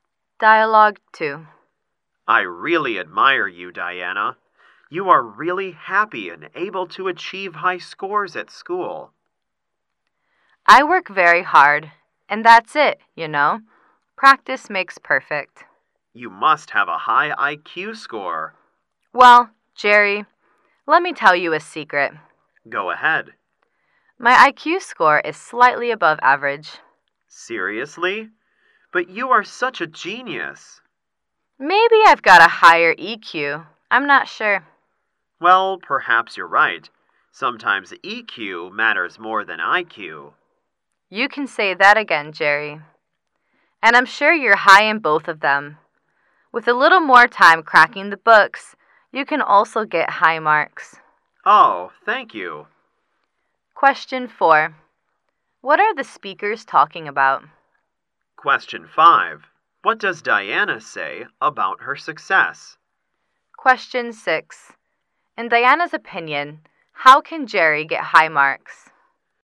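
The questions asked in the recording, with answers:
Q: What does Diana say about her success?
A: She works very hard; practice makes perfect

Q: In Diana's opinion, how can Jerry get high marks?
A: By spending a little more time studying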